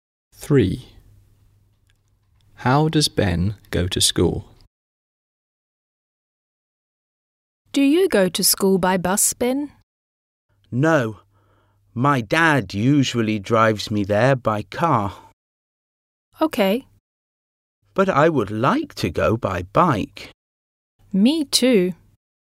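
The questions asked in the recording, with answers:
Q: How does Ben go to school?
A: by car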